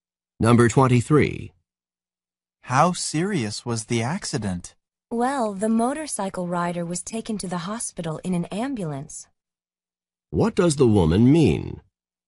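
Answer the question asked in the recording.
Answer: The accident was serious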